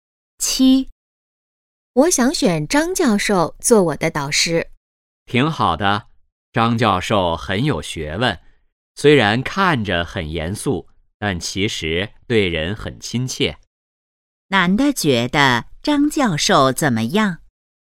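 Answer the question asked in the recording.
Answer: 很有学问,对人很亲切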